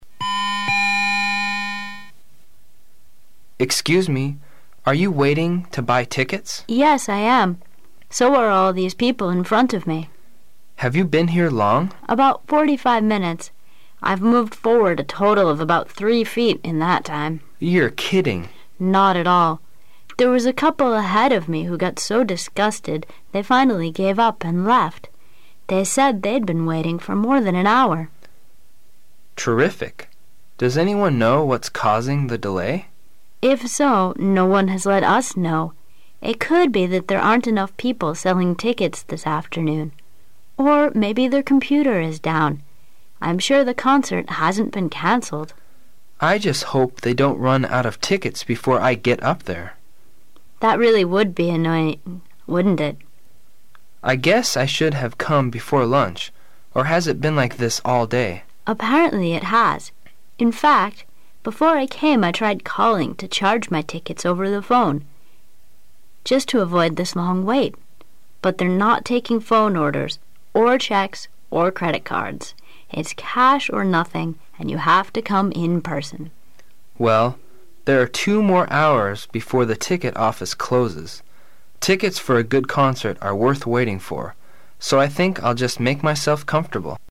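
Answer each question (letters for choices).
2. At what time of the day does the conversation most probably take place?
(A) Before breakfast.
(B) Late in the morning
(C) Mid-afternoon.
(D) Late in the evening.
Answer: C

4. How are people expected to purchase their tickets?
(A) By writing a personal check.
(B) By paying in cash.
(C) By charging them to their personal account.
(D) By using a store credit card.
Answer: B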